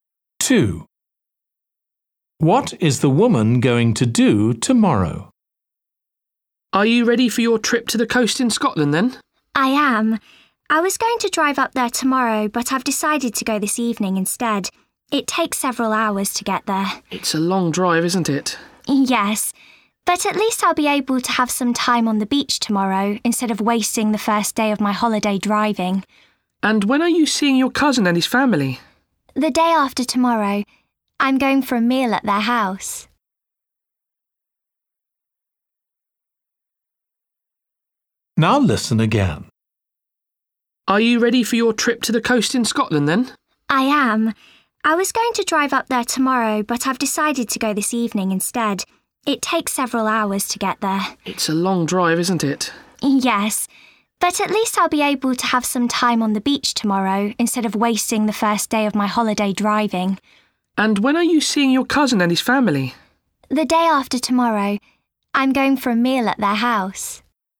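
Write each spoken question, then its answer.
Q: What is the woman going to do tomorrow?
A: spend time on the beach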